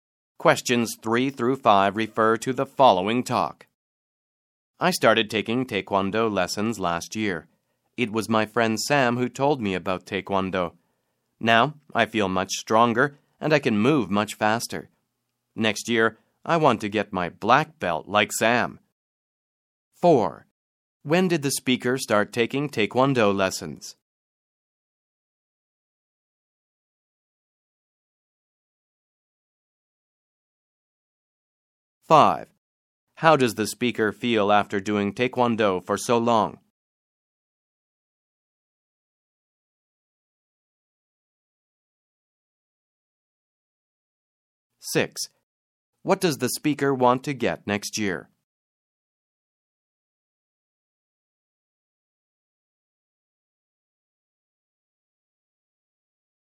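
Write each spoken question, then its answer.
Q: When did the speaker start taking Taekwondo lessons?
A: Last year

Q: How does the speaker feel after doing Taekwondo for so long?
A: Much stronger and able to move much faster

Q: What does the speaker want to get next year?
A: A black belt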